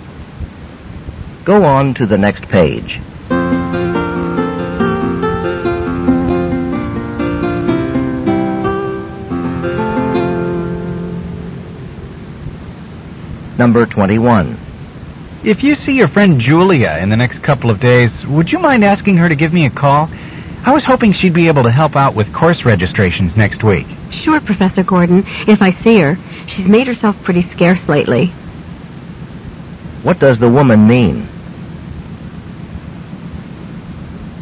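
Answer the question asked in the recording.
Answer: She hasn't seen Julia much lately.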